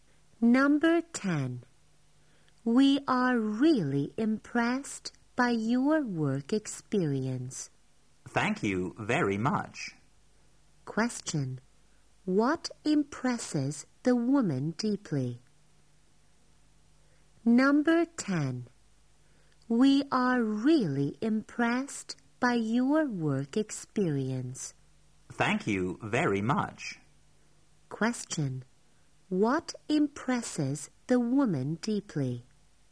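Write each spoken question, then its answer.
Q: What impresses the woman deeply?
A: The man's work experience.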